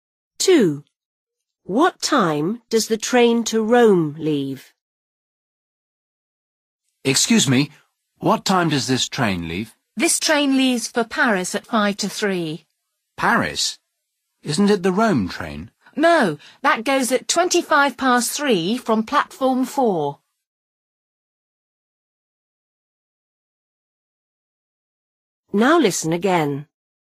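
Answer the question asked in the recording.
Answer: 3:25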